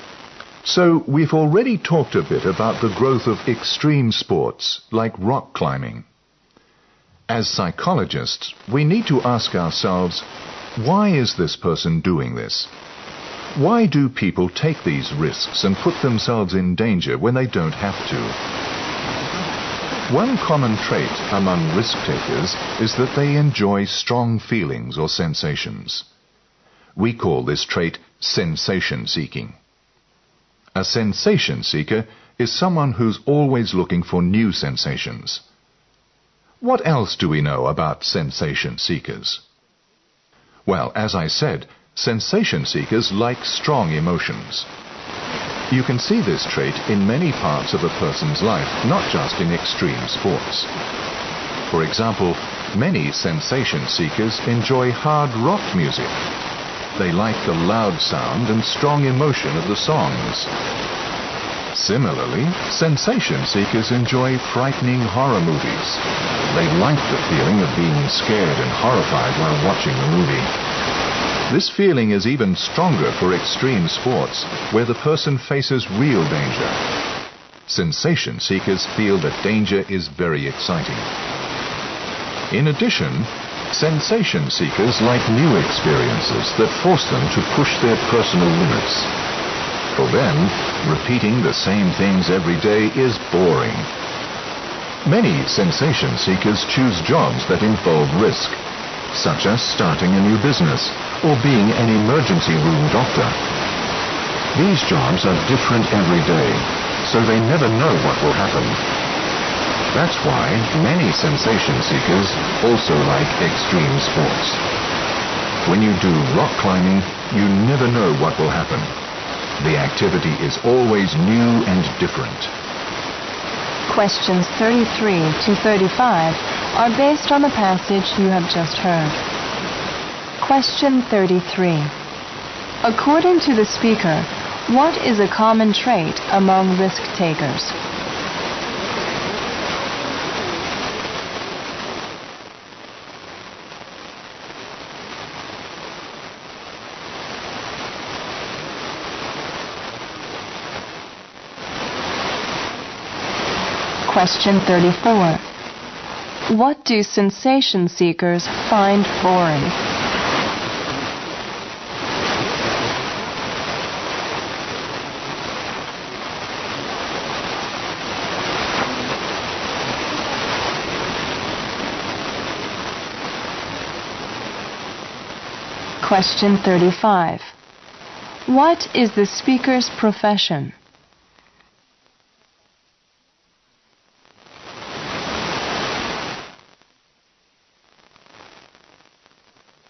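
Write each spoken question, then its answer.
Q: According to the speaker, what is a common trait among risk takers?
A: They enjoy strong feelings or sensations

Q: What do sensation seekers find boring?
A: Repeating the same things every day

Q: What is the speaker's profession?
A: Psychologist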